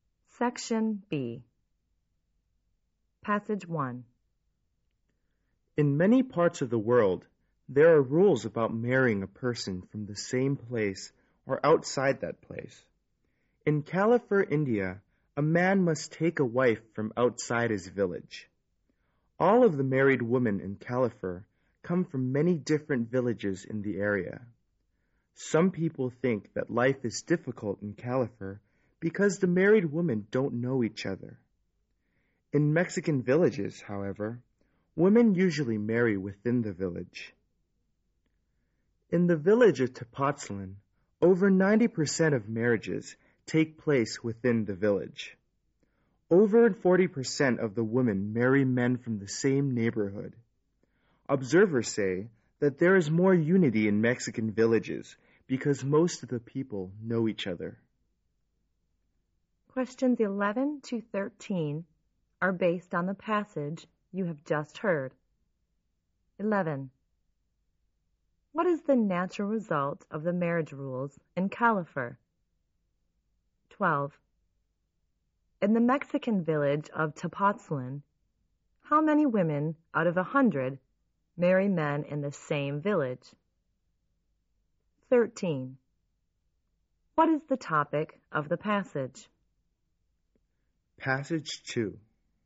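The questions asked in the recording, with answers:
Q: What is the natural result of the marriage rules in Califer?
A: The married women don't know each other.

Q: In the Mexican village of Tepoztlan, how many women out of 100 marry men in the same village?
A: Over 90

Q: What is the topic of the passage?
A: Rules about where people may marry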